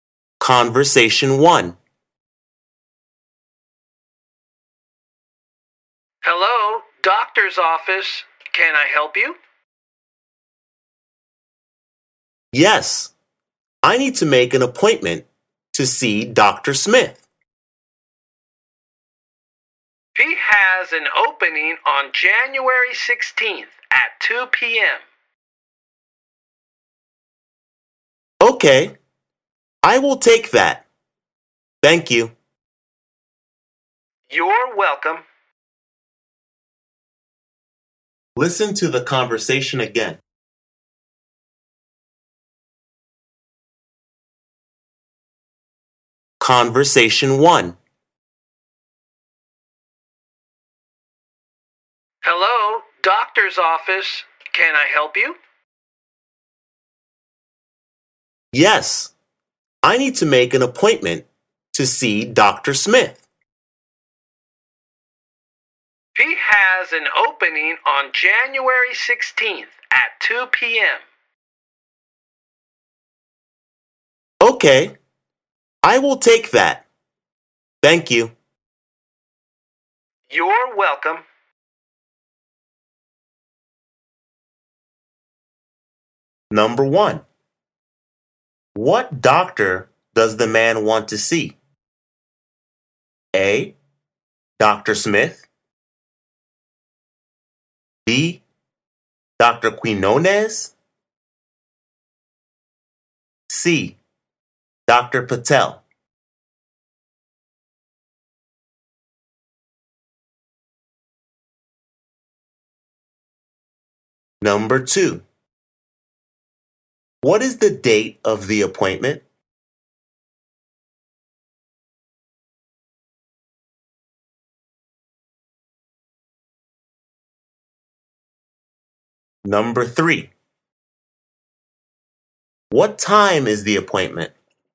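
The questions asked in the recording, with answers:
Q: What doctor does the man want to see?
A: A: Dr. Smith

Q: What is the date of the appointment?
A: January 16th

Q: What time is the appointment?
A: 2 p.m.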